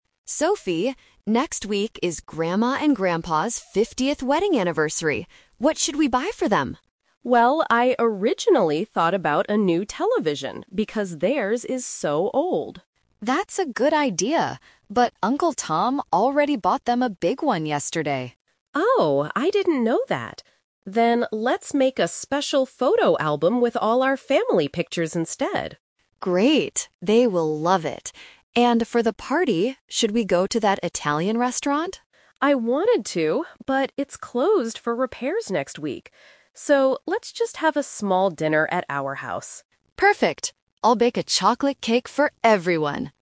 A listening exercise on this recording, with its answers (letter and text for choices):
Listen to two sisters, Amy and Sophie, talking about their grandparents' anniversary. For each question, choose the correct answer (A, B, or C).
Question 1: What gift will the sisters give to their grandparents?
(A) A new television.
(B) A photo album.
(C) A new camera.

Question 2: Where will the anniversary party be held?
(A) At an Italian restaurant.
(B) At the grandparents' house.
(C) At the sisters' home.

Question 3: What is Amy going to do for the party?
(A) She is going to buy a cake.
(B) She is going to make a cake.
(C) She is going to cook an Italian dinner.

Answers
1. (B) A photo album.
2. (C) At the sisters' home.
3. (B) She is going to make a cake.

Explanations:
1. Sophie suggests a television (Option A - Trap), but Amy says Uncle Tom already bought one. They finally agree to "make a special photo album" (Option B - Key). Option C is not mentioned in the dialogue.
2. Amy suggests a restaurant (Option A - Trap), but Sophie explains it is closed for repairs. She then says, "let's just have a small dinner at our house" (Option C - Key). Option B is a distractor because it mentions a house, but it's not the grandparents' house.
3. Amy says, "I'll bake a chocolate cake," which means she will make it herself (Option B - Key). Option A is wrong because she isn't buying it. Option C is a trap related to the earlier mention of the Italian restaurant.

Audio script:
Amy: Sophie, next week is Grandma and Grandpa's 50th wedding anniversary. What should we buy for them?
Sophie: Well, I originally thought about a new television because theirs is so old.
Amy: That's a good idea, but Uncle Tom already bought them a big one yesterday.
Sophie: Oh, I didn't know that. Then let's make a special photo album with all our family pictures instead.
Amy: Great! They will love it. And for the party, should we go to that Italian restaurant?
Sophie: I wanted to, but it's closed for repairs next week. So, let's just have a small dinner at our house.